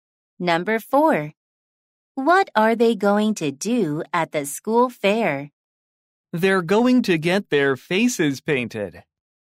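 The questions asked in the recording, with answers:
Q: What are they going to do at the school fair?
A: get their faces painted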